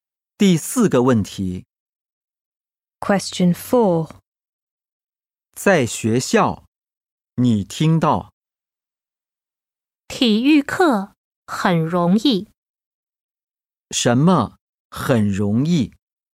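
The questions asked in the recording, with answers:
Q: 什么很容易?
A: 体育课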